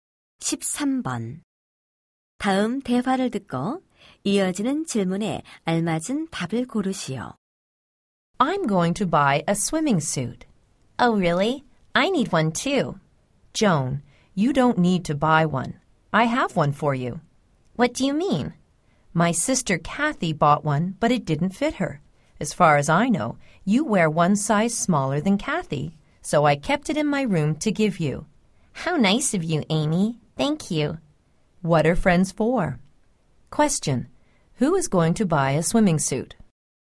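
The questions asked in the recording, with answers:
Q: Who is going to buy a swimming suit?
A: Amy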